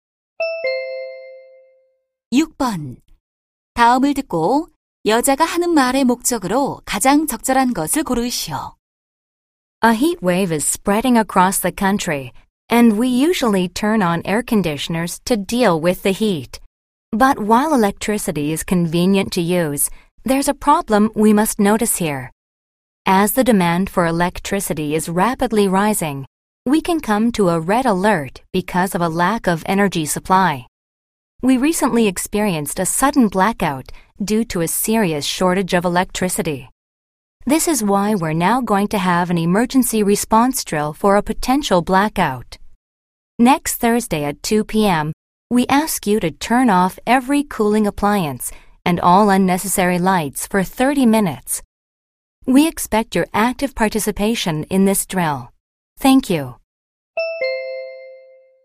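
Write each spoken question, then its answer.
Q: 다음을 듣고 여자가 하는 말의 목적으로 가장 적절한 것을 고르시오.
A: 정전 대비 비상 훈련 참여 요청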